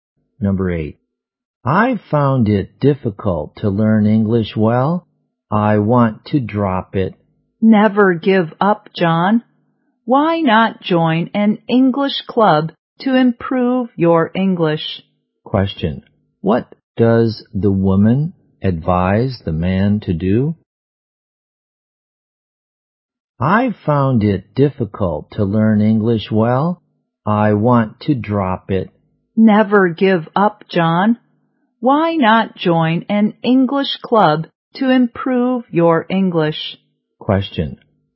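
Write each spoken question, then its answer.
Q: What does the woman advise the man to do?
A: Join an English club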